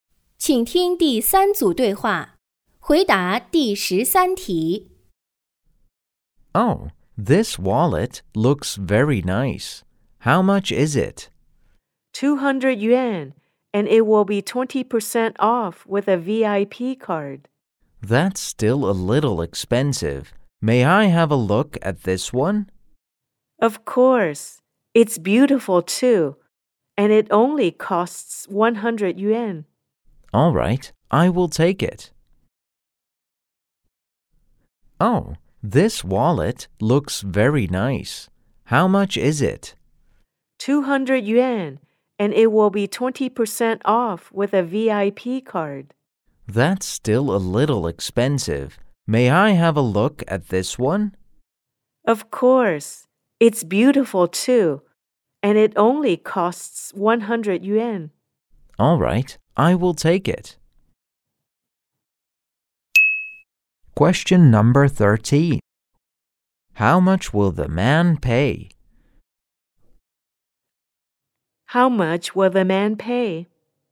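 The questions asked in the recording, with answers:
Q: How much will the man pay?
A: 100 yuan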